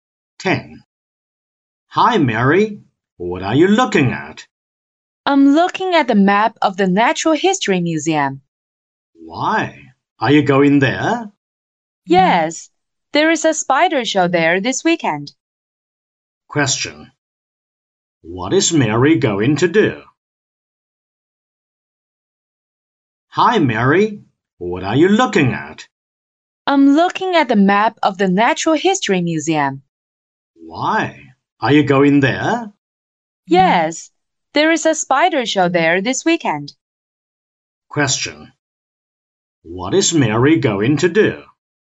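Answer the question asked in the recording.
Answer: Go to the spider show at the Natural History Museum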